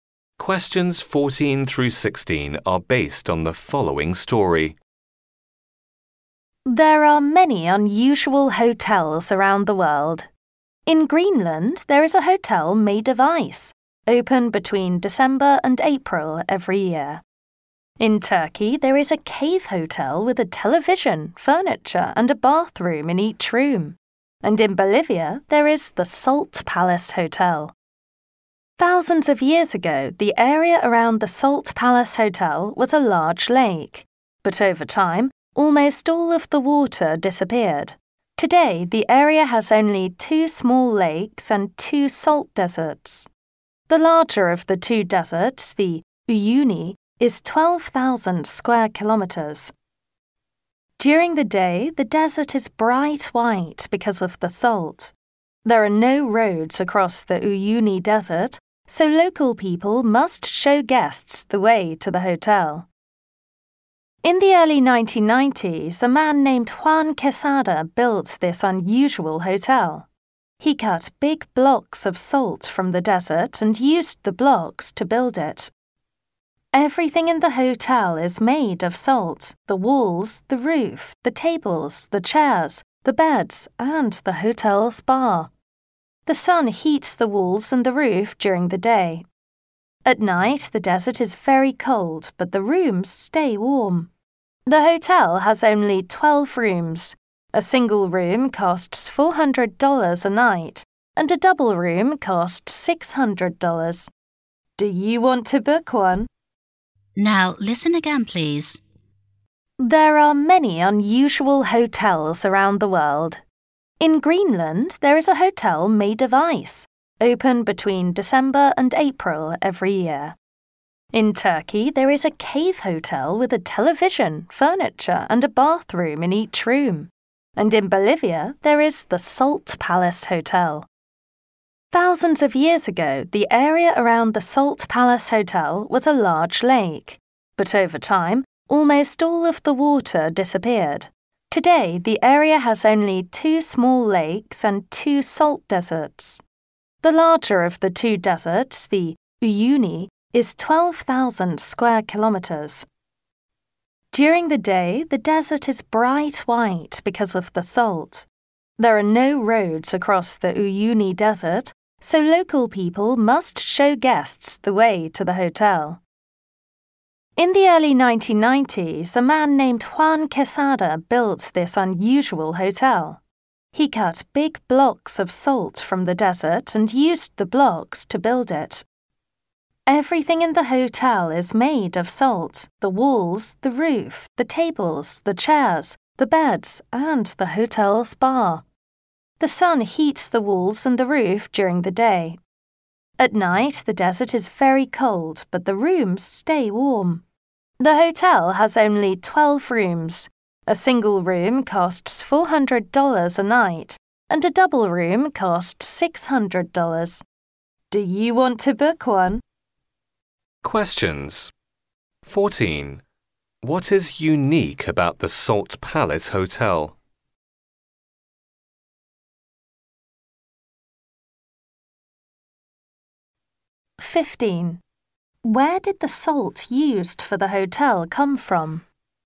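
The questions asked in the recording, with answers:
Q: What is unique about the Salt Palace Hotel?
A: Everything in it is made of salt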